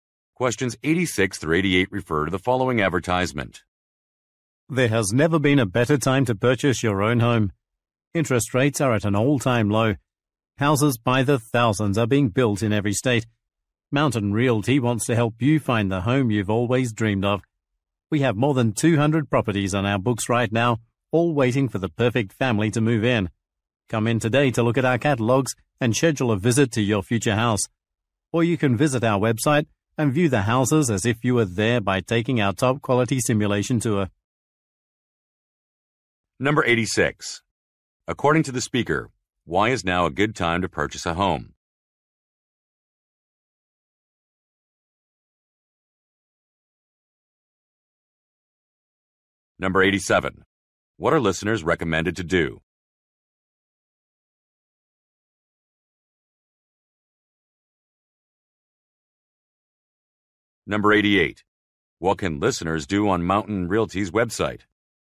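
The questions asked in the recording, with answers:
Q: According to the speaker, why is now a good time to purchase a home?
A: Interest rates are at an all-time low.

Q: What are listeners recommended to do?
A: Come in to look at catalogs and schedule a visit.

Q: What can listeners do on Mountain Realty's website?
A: Take a simulated tour of the houses.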